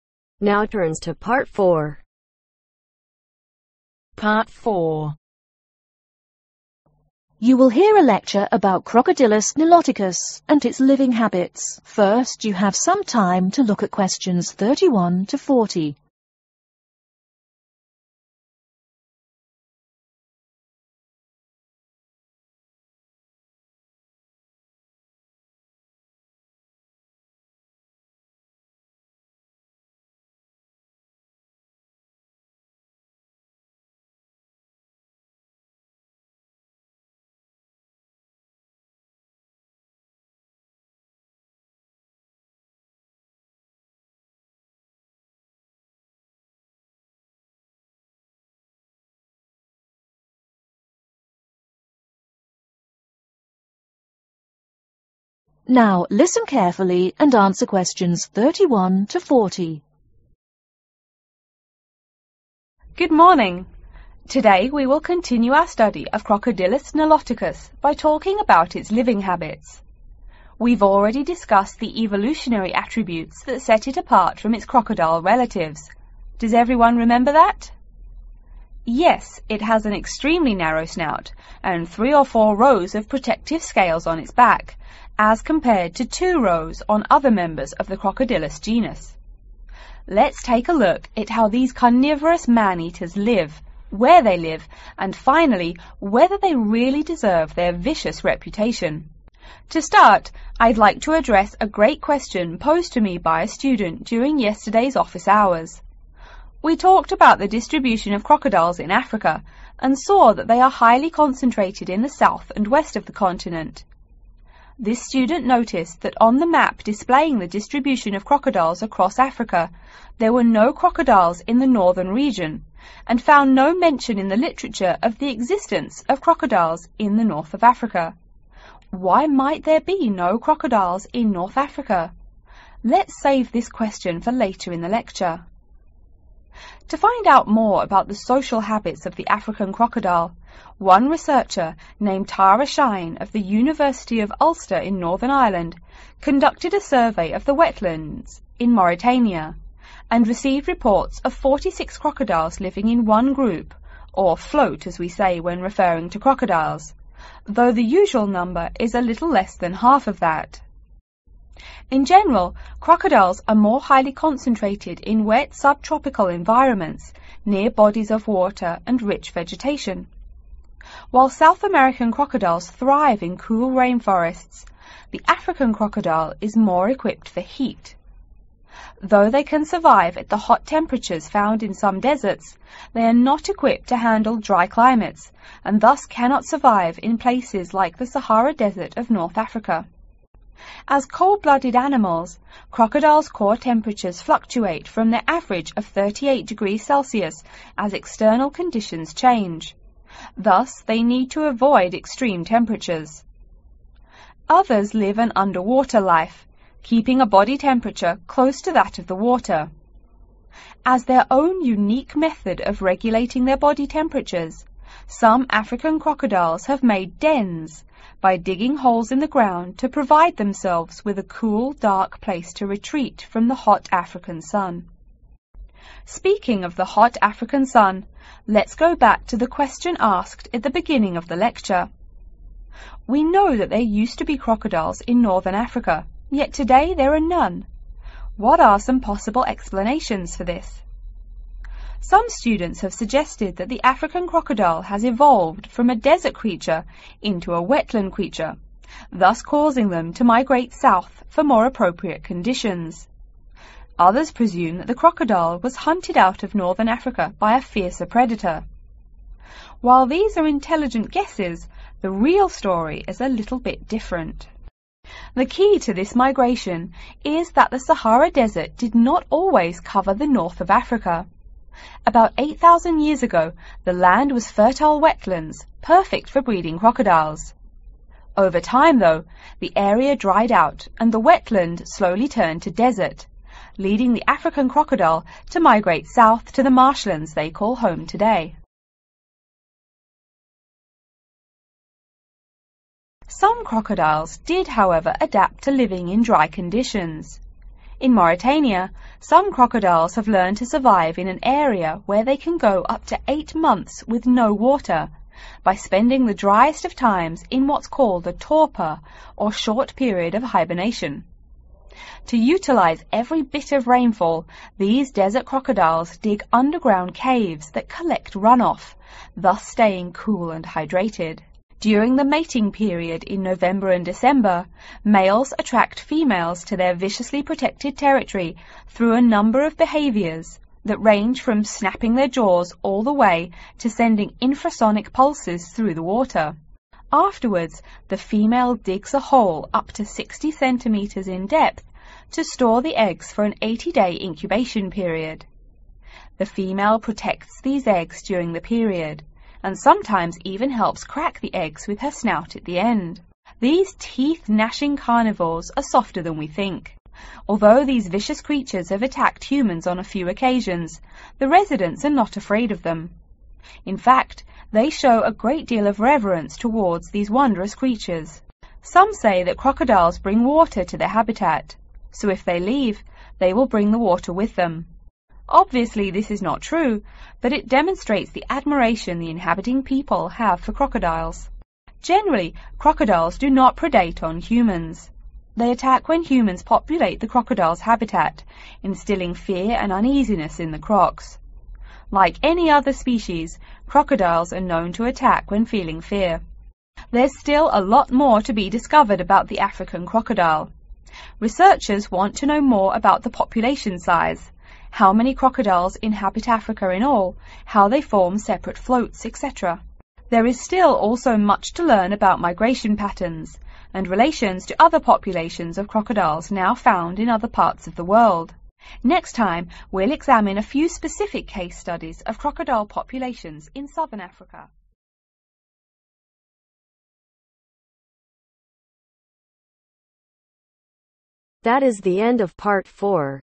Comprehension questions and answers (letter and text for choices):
Choose the correct letter A , B or C.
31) The student thought there were no crocodiles in Northern Africa because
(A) North Africa contains very little wildlife for the crocodile to prey on.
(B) she found no mention in the literature of their existence there.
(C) there is very little water in North Africa.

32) Crocodiles live in groups of about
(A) 20.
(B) 38.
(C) 46.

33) African crocodiles usually live in areas with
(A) hot, dry climates.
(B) hot, wet rainforests.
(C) warm, wet climates.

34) Crocodiles in dry area live in caves located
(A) underground.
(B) in mountainsides.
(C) underwater.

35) What change caused changes in crocodiles populations in North Africa ?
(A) They were driven away by a fierce predator.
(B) Crocodiles evolved from desert creatures to wetland creatures.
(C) North Africa used to be wetland but slowly turned to desert over time.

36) Desert crocodiles sometimes live in places with dry periods that last up to ............ months.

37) A hole dug by a female crocodile in which to lay eggs can have a ............ of up to 60 cm.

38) Local people do not ............ crocodiles.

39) Crocodiles ............ out of fear when humans populate their habitual.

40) Researchers want to study more about population size, ............ patterns and relations to other populations of crocodiles.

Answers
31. (B) she found no mention in the literature of their existence there.
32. (A) 20.
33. (C) warm, wet climates.
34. (A) underground.
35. (C) North Africa used to be wetland but slowly turned to desert over time.
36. Eight
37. Depth
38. Fear
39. Attack
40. Migration